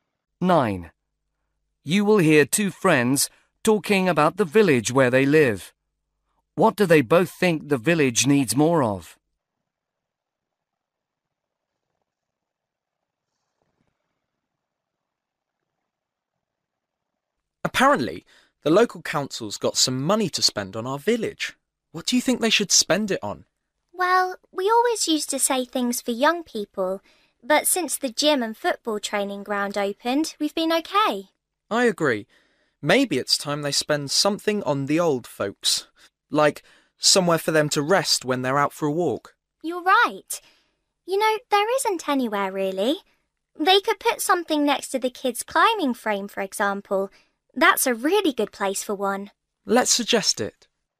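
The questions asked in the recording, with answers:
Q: What do they both think the village needs more of?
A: Places (benches) for old people to rest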